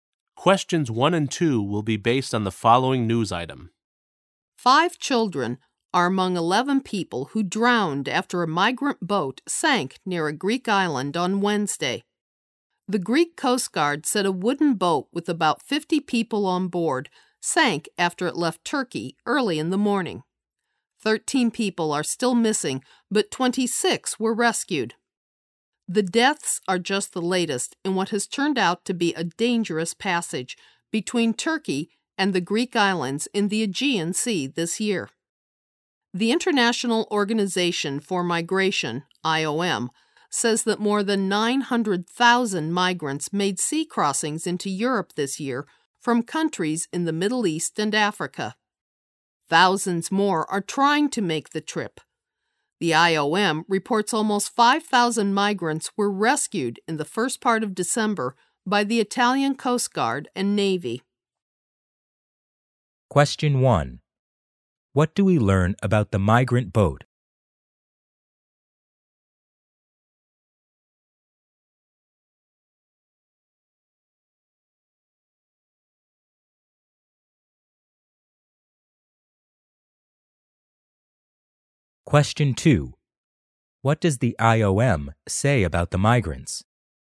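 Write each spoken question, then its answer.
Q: What do we learn about the migrant boat?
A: It sank near a Greek island with about 50 people on board after leaving Turkey.

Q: What does the IOM say about the migrants?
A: More than 900,000 migrants crossed the sea into Europe this year.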